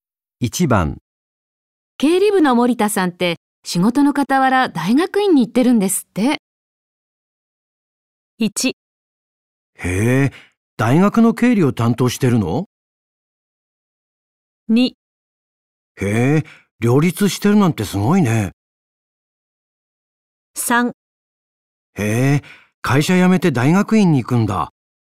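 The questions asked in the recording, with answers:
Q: 経理部の森田さんって仕事の傍ら大学院に行ってるんですって。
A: 2: へえ、両立してるなんてすごいね。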